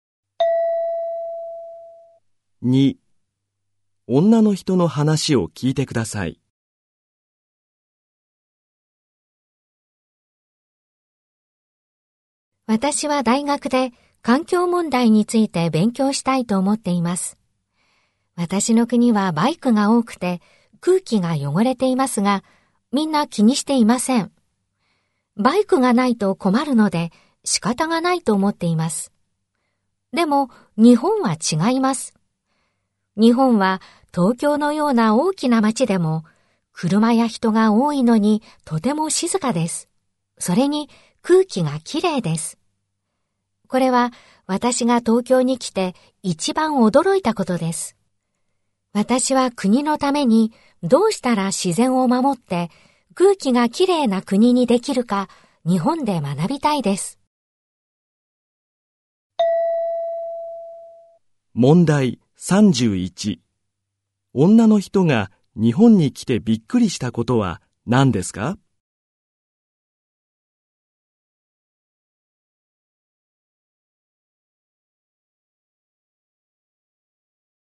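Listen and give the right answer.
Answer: 東京は車や人が多いのに静かで空気がきれいなこと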